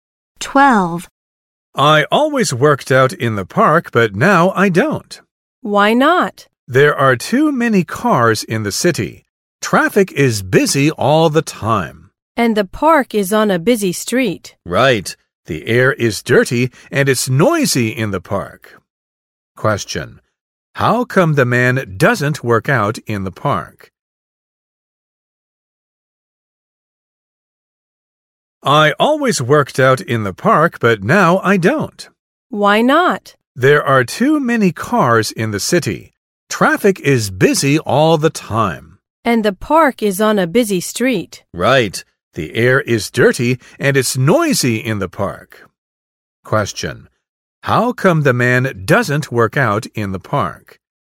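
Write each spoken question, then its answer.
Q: Question. How come the man doesn't work out in the park?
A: The park is on a busy street, so the air is dirty and it's noisy.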